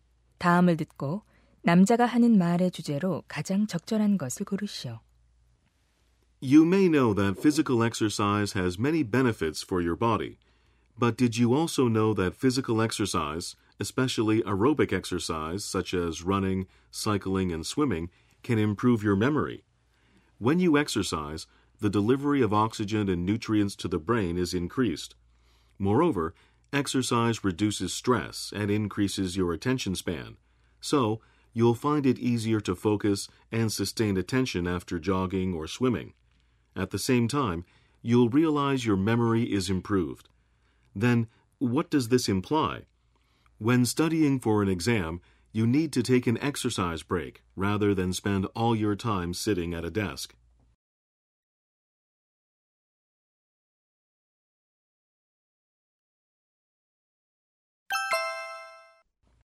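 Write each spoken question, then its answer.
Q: 다음을 듣고 남자가 하는 말의 주제로 가장 적절한 것을 고르시오.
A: 유산소 운동이 기억력 향상에 도움이 된다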